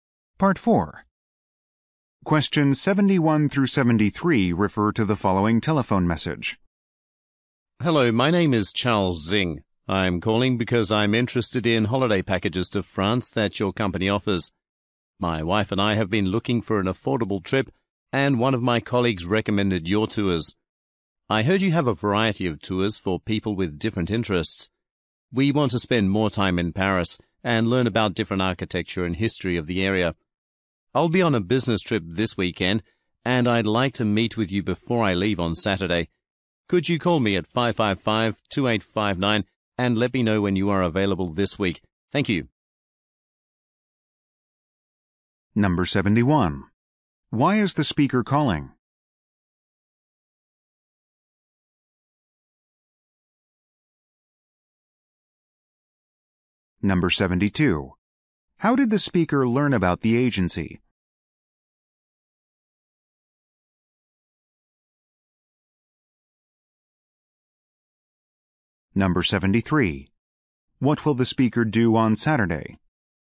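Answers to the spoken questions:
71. He is interested in holiday packages to France
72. A colleague recommended it
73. Leave on a business trip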